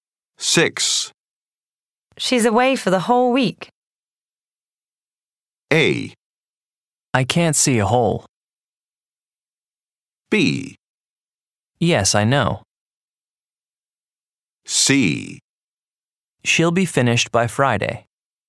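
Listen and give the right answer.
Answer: B: Yes, I know.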